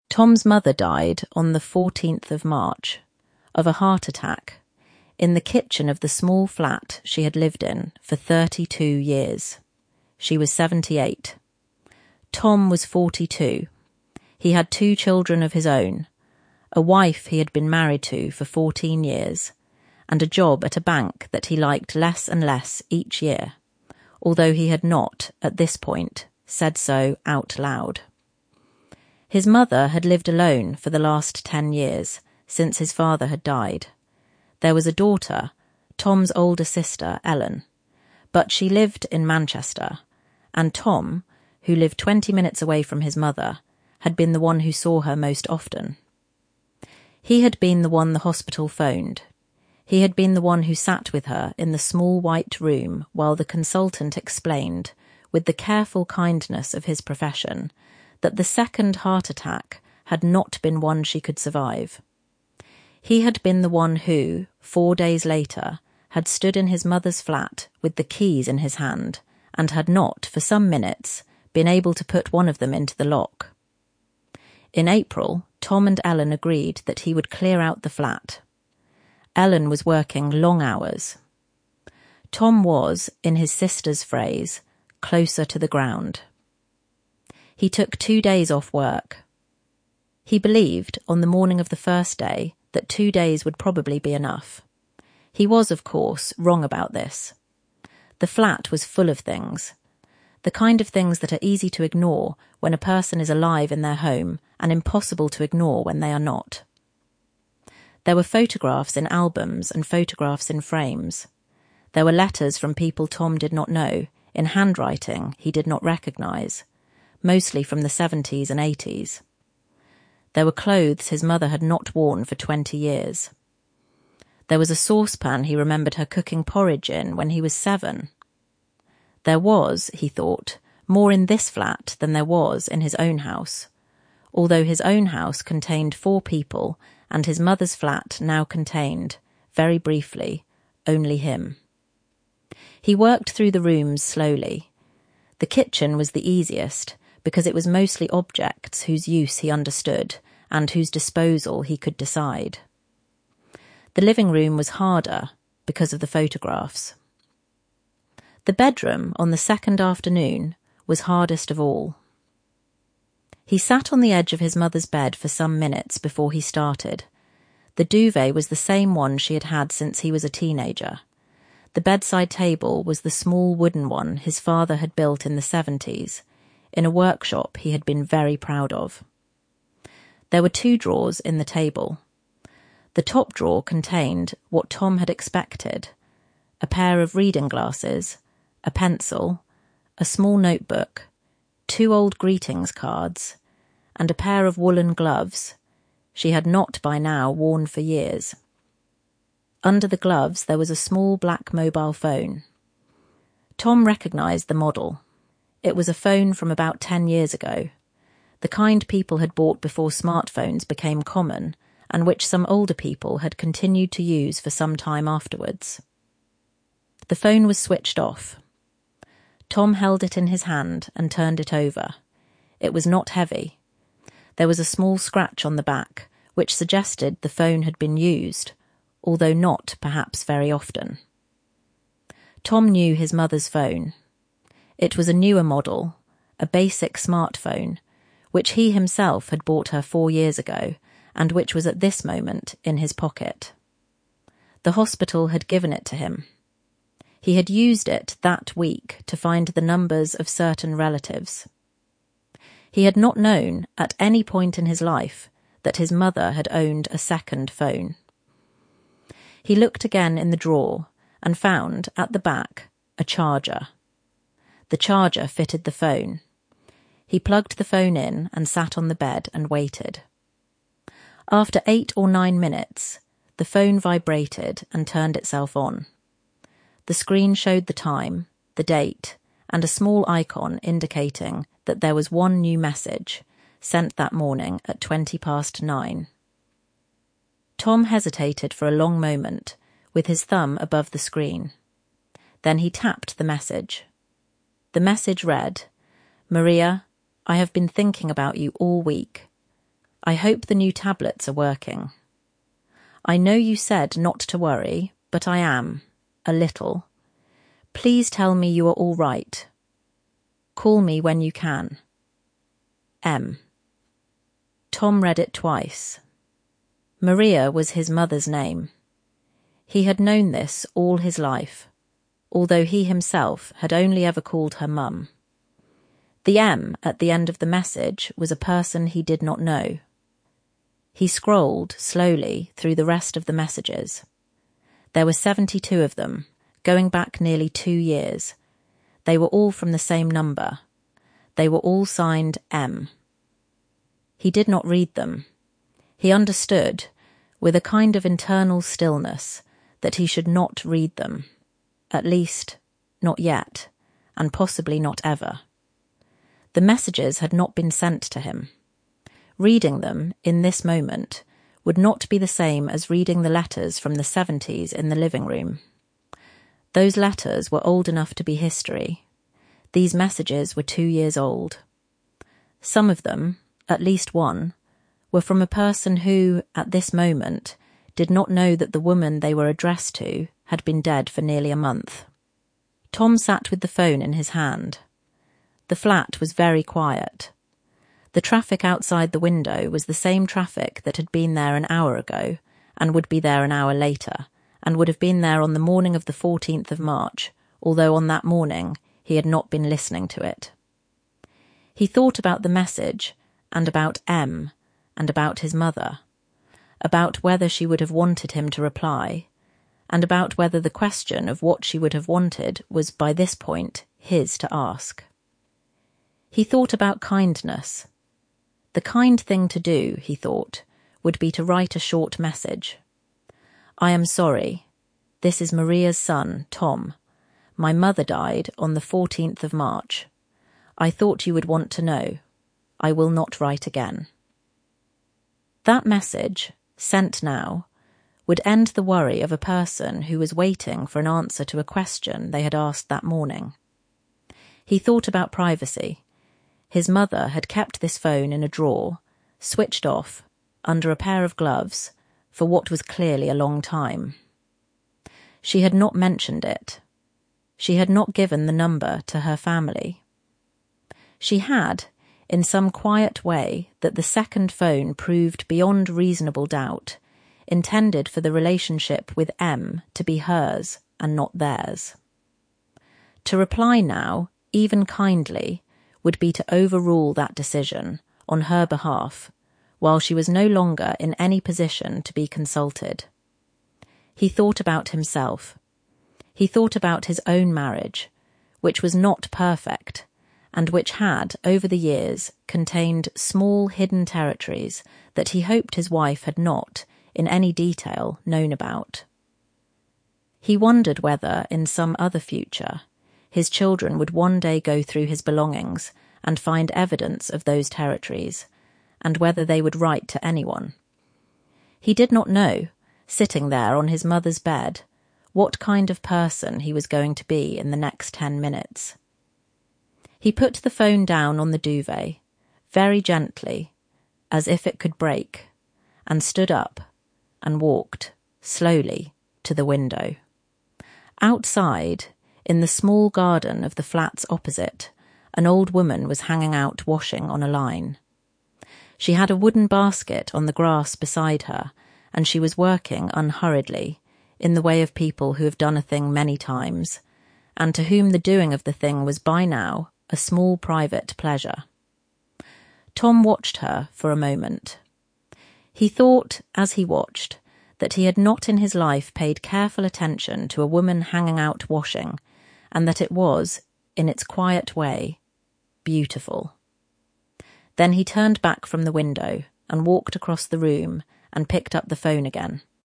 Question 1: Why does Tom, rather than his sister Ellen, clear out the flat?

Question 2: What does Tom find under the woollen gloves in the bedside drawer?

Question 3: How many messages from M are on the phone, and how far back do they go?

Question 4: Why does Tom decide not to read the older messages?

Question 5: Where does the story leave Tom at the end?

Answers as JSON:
{"1": "Ellen lives in Manchester and is working long hours.", "2": "A small black mobile phone, an old model from about ten years ago.", "3": "Seventy-two messages, going back nearly two years.", "4": "The messages were not sent to him.", "5": "then turned back and picked up the phone again"}

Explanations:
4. They are too recent to be 'history' in the way the seventies letters in the living room are. Some of the messages are from a person who, at this moment, does not know that Maria has died.

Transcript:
Tom's mother died on the 14th of March, of a heart attack, in the kitchen of the small flat she had lived in for thirty-two years. Tom was forty-two. He had two children of his own, a wife he had been married to for fourteen years, and a job at a bank that he liked less and less each year, although he had not, at this point, said so out loud.
His mother had lived alone for the last ten years, since his father had died. There was a daughter — Tom's older sister, Ellen — but she lived in Manchester, and Tom, who lived twenty minutes away from his mother, had been the one who saw her most often. He had been the one the hospital phoned. He had been the one who sat with her in the small white room while the consultant explained, with the careful kindness of his profession, that the second heart attack had not been one she could survive. He had been the one who, four days later, had stood in his mother's flat with the keys in his hand and had not, for some minutes, been able to put one of them into the lock.
In April, Tom and Ellen agreed that he would clear out the flat. Ellen was working long hours. Tom was, in his sister's phrase, 'closer to the ground'. He took two days off work. He believed, on the morning of the first day, that two days would probably be enough.
He was, of course, wrong about this. The flat was full of things — the kind of things that are easy to ignore when a person is alive in their home and impossible to ignore when they are not. There were photographs in albums and photographs in frames. There were letters from people Tom did not know, in handwriting he did not recognise, mostly from the seventies and eighties. There were clothes his mother had not worn for twenty years. There was a saucepan he remembered her cooking porridge in when he was seven. There was, he thought, more in this flat than there was in his own house, although his own house contained four people and his mother's flat now contained, very briefly, only him.
He worked through the rooms slowly. The kitchen was the easiest, because it was mostly objects whose use he understood and whose disposal he could decide. The living room was harder, because of the photographs. The bedroom, on the second afternoon, was hardest of all.
He sat on the edge of his mother's bed for some minutes before he started. The duvet was the same one she had had since he was a teenager. The bedside table was the small wooden one his father had built in the seventies, in a workshop he had been very proud of. There were two drawers in the table.
The top drawer contained what Tom had expected: a pair of reading glasses, a pencil, a small notebook, two old greetings cards, and a pair of woollen gloves she had not, by now, worn for years.
Under the gloves, there was a small black mobile phone.
Tom recognised the model. It was a phone from about ten years ago — the kind people had bought before smartphones became common, and which some older people had continued to use for some time afterwards. The phone was switched off. Tom held it in his hand and turned it over. It was not heavy. There was a small scratch on the back, which suggested the phone had been used, although not, perhaps, very often.
Tom knew his mother's phone. It was a newer model, a basic smartphone, which he himself had bought her four years ago, and which was at this moment in his pocket. The hospital had given it to him. He had used it that week to find the numbers of certain relatives.
He had not known, at any point in his life, that his mother had owned a second phone.
He looked again in the drawer, and found, at the back, a charger. The charger fitted the phone. He plugged the phone in and sat on the bed and waited.
After eight or nine minutes, the phone vibrated and turned itself on. The screen showed the time, the date, and a small icon indicating that there was one new message, sent that morning at twenty past nine.
Tom hesitated for a long moment, with his thumb above the screen. Then he tapped the message.
The message read
'Maria, I have been thinking about you all week. I hope the new tablets are working. I know you said not to worry, but I am, a little. Please tell me you are all right. Call me when you can. M.'
Tom read it twice.
Maria was his mother's name. He had known this all his life, although he himself had only ever called her Mum. The 'M' at the end of the message was a person he did not know.
He scrolled, slowly, through the rest of the messages. There were seventy-two of them, going back nearly two years. They were all from the same number. They were all signed 'M'.
He did not read them. He understood, with a kind of internal stillness, that he should not read them — at least, not yet, and possibly not ever. The messages had not been sent to him. Reading them, in this moment, would not be the same as reading the letters from the seventies in the living room. Those letters were old enough to be history. These messages were two years old. Some of them — at least one — were from a person who, at this moment, did not know that the woman they were addressed to had been dead for nearly a month.
Tom sat with the phone in his hand. The flat was very quiet. The traffic outside the window was the same traffic that had been there an hour ago, and would be there an hour later, and would have been there on the morning of the 14th of March, although on that morning he had not been listening to it.
He thought about the message, and about M, and about his mother — about whether she would have wanted him to reply, and about whether the question of what she would have wanted was, by this point, his to ask.
He thought about kindness. The kind thing to do, he thought, would be to write a short message: 'I am sorry. This is Maria's son, Tom. I thought you would want to know. I will not write again.' That message, sent now, would end the worry of a person who was waiting for an answer to a question they had asked that morning.
His mother had kept this phone in a drawer, switched off, under a pair of gloves, for what was clearly a long time. She had not mentioned it. She had not given the number to her family. She had, in some quiet way that the second phone proved beyond reasonable doubt, intended for the relationship with M to be hers and not theirs. To reply now, even kindly, would be to overrule that decision, on her behalf, while she was no longer in any position to be consulted.
He thought about his own marriage, which was not perfect, and which had, over the years, contained small hidden territories that he hoped his wife had not, in any detail, known about. He wondered whether, in some other future, his children would one day go through his belongings and find evidence of those territories, and whether they would write to anyone.
He did not know, sitting there on his mother's bed, what kind of person he was going to be in the next ten minutes.
He put the phone down on the duvet, very gently, as if it could break, and stood up, and walked, slowly, to the window.
Outside, in the small garden of the flats opposite, an old woman was hanging out washing on a line. She had a wooden basket on the grass beside her, and she was working unhurriedly, in the way of people who have done a thing many times, and to whom the doing of the thing was, by now, a small private pleasure. Tom watched her for a moment. He thought, as he watched, that he had not in his life paid careful attention to a woman hanging out washing, and that it was, in its quiet way, beautiful.
Then he turned back from the window, and walked across the room, and picked up the phone again.